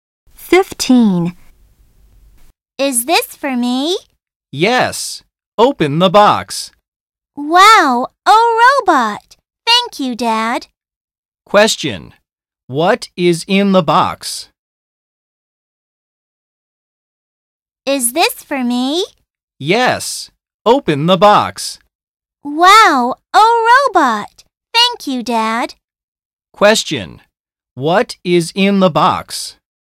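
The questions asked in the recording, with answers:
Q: What is in the box?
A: A robot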